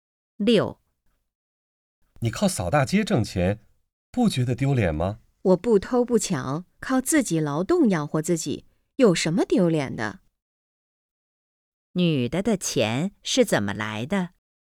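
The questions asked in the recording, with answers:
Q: 女的的钱是怎么来的?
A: 靠扫大街挣的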